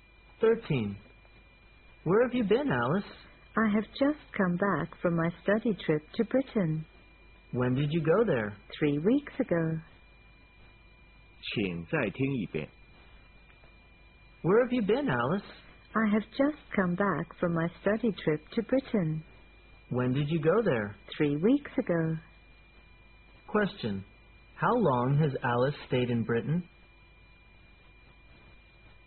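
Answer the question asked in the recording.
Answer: About three weeks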